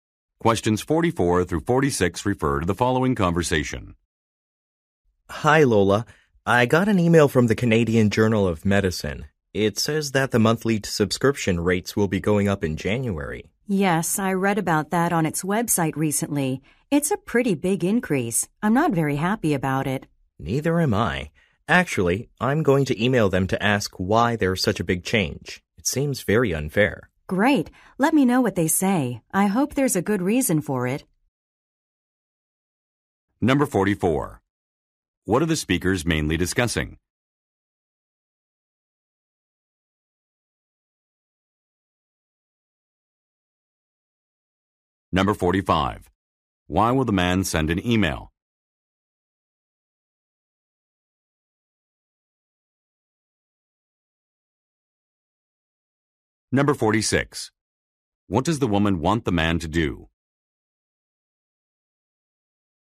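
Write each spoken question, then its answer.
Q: What are the speakers mainly discussing?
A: An increase in journal subscription rates

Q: Why will the man send an email?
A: To ask why the rates are increasing so much

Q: What does the woman want the man to do?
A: Tell her what the journal replies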